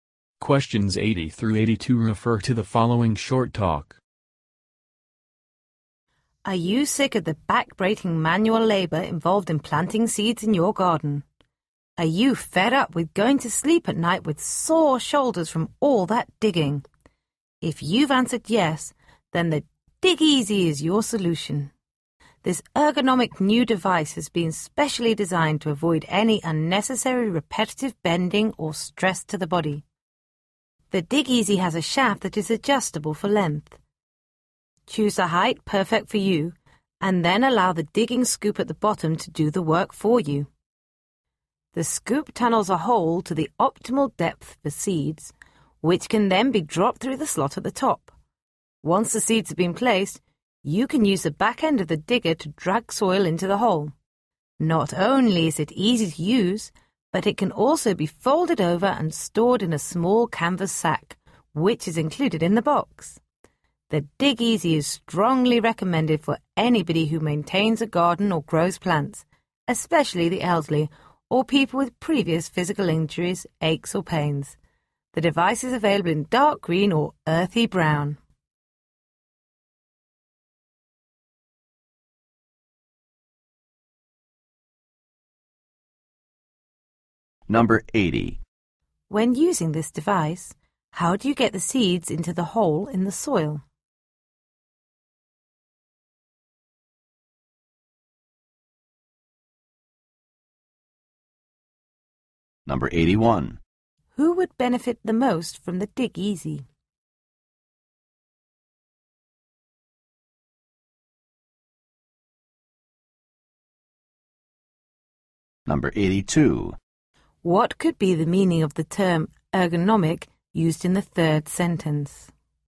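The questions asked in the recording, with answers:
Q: When using this device, how do you get the seeds into the hole in the soil?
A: Drop them through the slot at the top

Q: Who would benefit the most from the Dig Easy?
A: The elderly or people with injuries, aches or pains

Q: What could be the meaning of the term ergonomic used in the third sentence?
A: Designed to avoid strain or stress on the body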